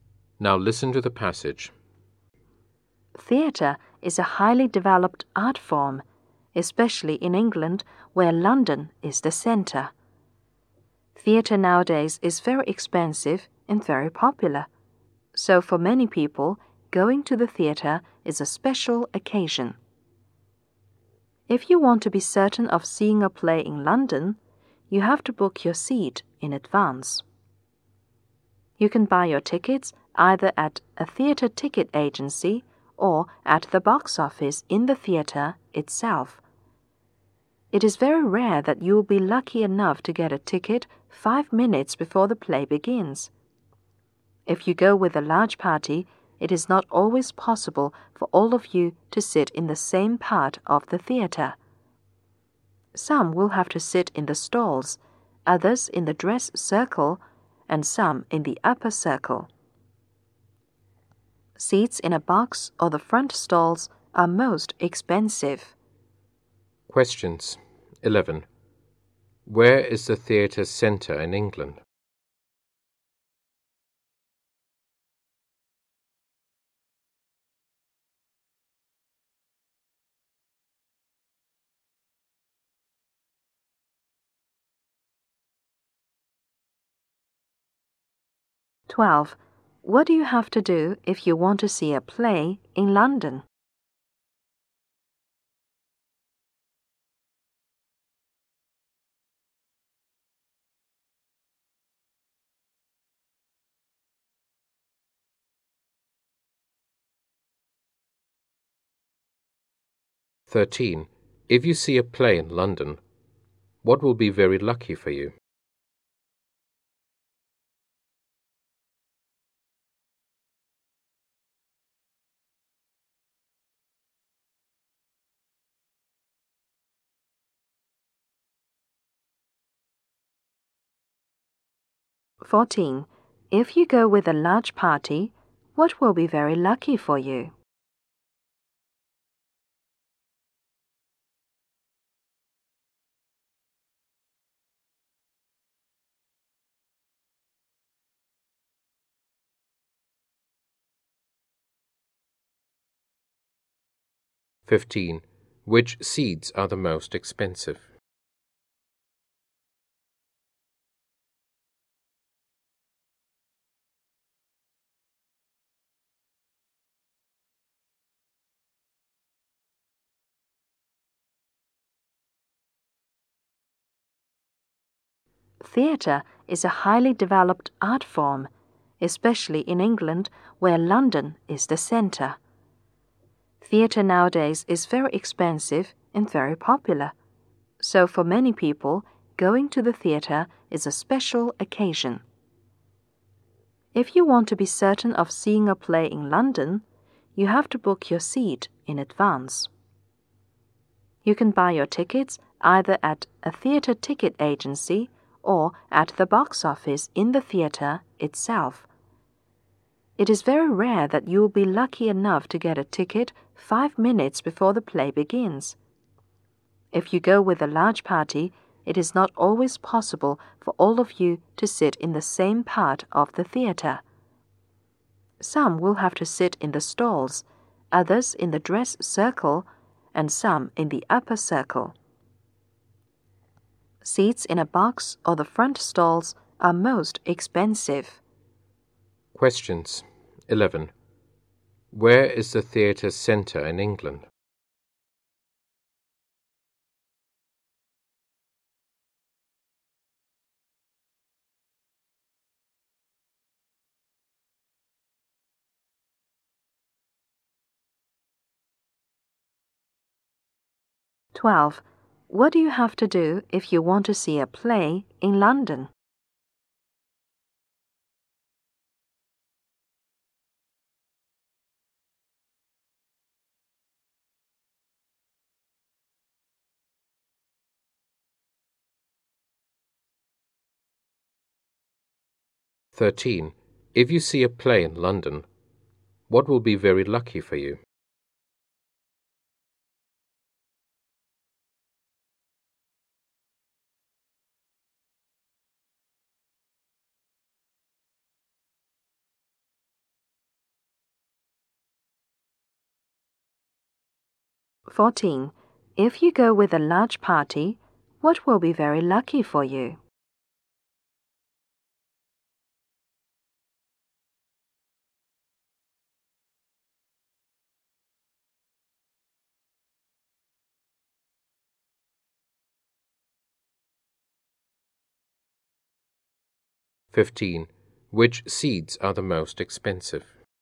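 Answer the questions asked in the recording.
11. London
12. Book your seat in advance
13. Getting a ticket 5 minutes before the play begins
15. Seats in a box or the front stalls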